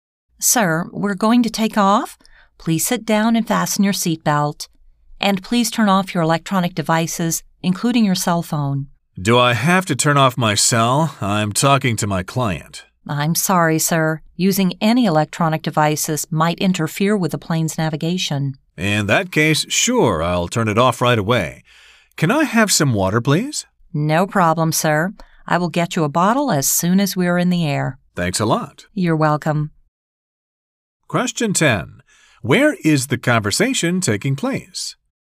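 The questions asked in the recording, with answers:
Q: Where is the conversation taking place?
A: On an airplane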